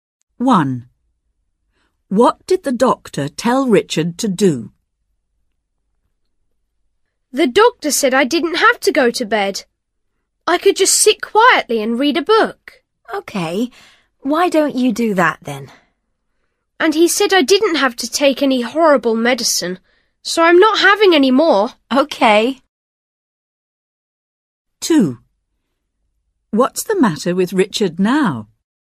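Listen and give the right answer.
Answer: Sit quietly and read a book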